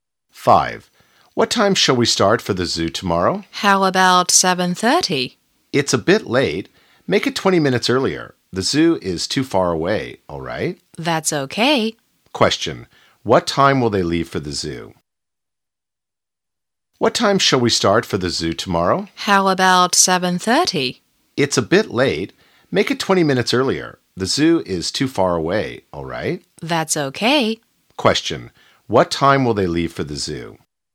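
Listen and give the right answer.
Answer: At 7:10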